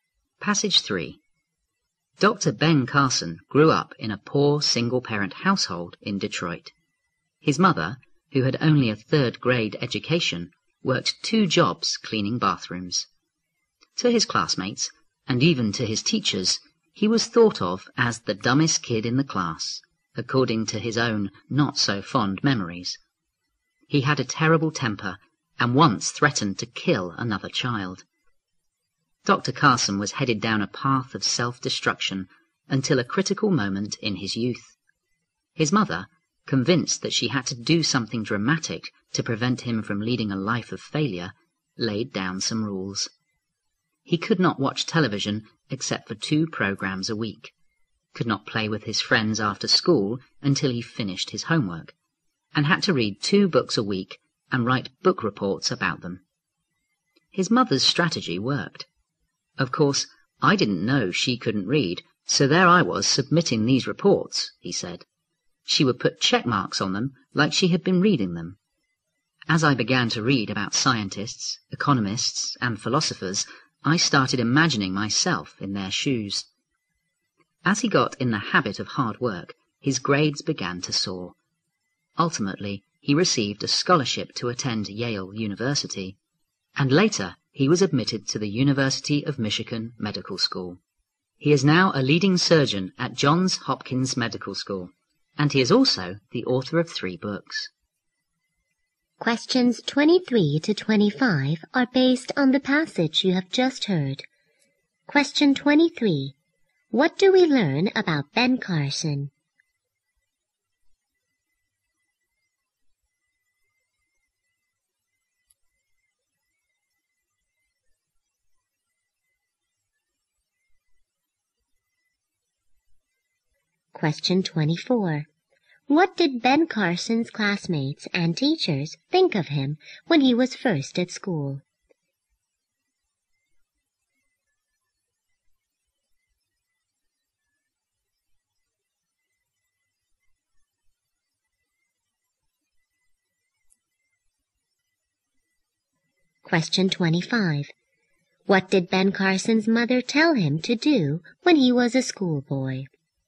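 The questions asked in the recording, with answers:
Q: What do we learn about Ben Carson?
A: He grew up poor in a single-parent household and became a leading surgeon.

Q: What did Ben Carson's classmates and teachers think of him when he was first at school?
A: That he was the dumbest kid in the class.

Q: What did Ben Carson's mother tell him to do when he was a schoolboy?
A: Read two books a week and write book reports about them.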